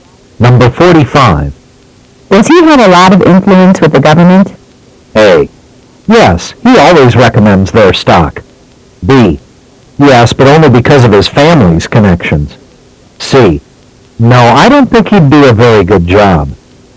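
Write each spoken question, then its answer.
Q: Does he have a lot of influence with the government?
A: B: Yes, but only because of his family's connections.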